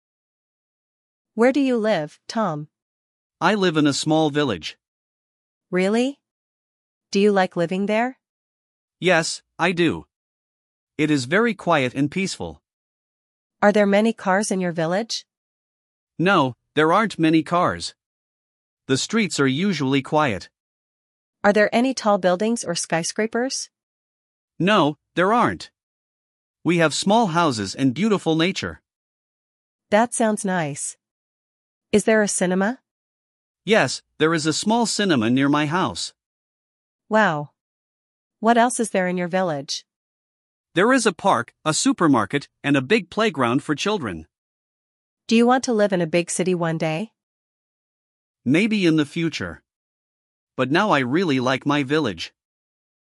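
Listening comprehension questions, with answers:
67. Listen to another dialogue and choose True or False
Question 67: Tom lives in a big city.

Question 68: Tom likes living in the village.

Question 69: There are many cars in the village.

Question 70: There are skyscrapers in the village.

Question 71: There is a cinema near Tom's house.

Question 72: There is a park in the village.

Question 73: Tom hates his village.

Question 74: Tom wants to move to the city right now.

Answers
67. False
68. True
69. False
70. False
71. True
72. True
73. False
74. False

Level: LEVEL A1/A2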